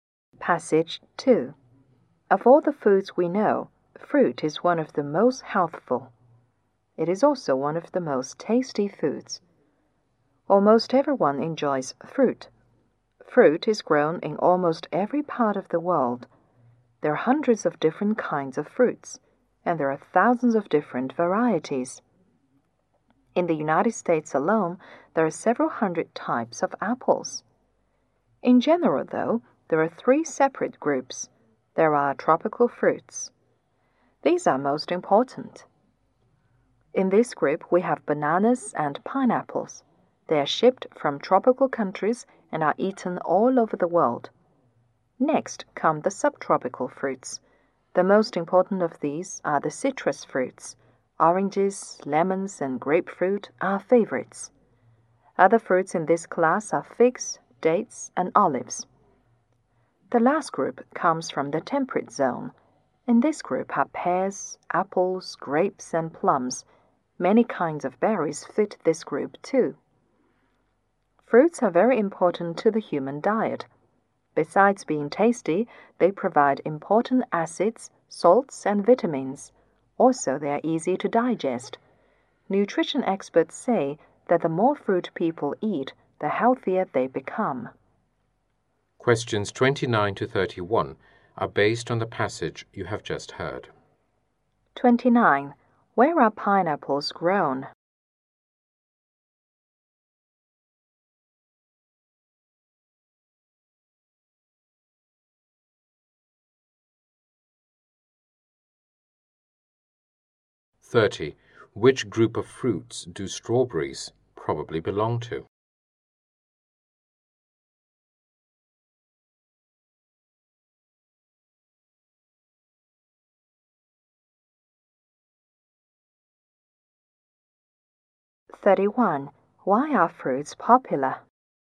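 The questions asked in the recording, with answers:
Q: Where are pineapples grown?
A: In tropical countries

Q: Which group of fruits do strawberries probably belong to?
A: Temperate zone fruits

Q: Why are fruits popular?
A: They are tasty and healthful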